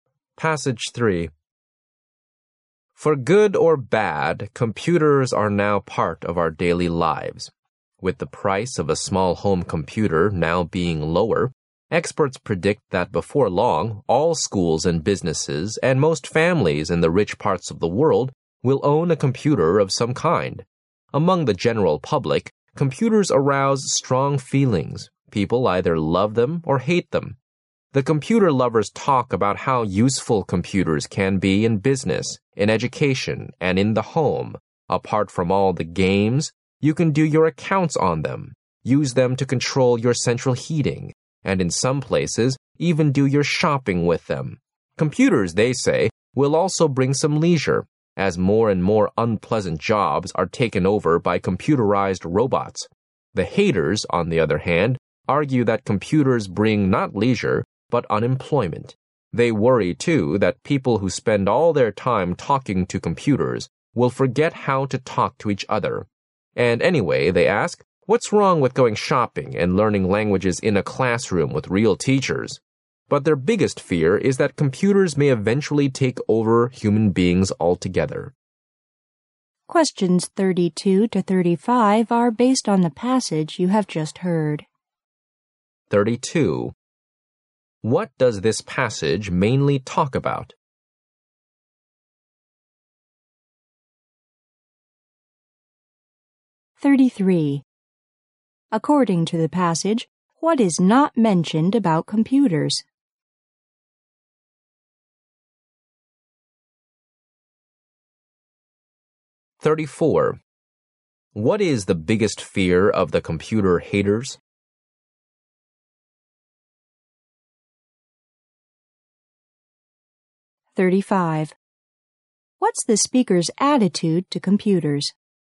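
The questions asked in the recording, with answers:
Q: What does this passage mainly talk about?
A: People's different attitudes toward computers

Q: What is the biggest fear of the computer haters?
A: That computers may eventually take over human beings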